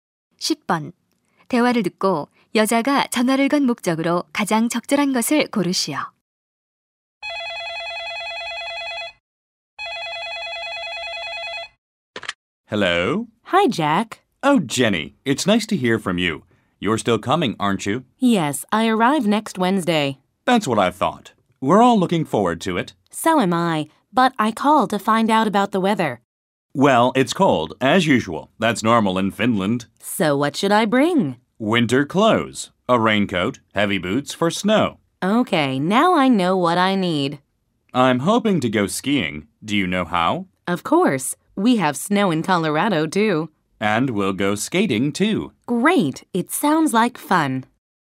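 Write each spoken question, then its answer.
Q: 대화를 듣고 여자가 전화를 건 목적으로 가장 적절한 것을 고르시오.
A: 날씨를 물어보려고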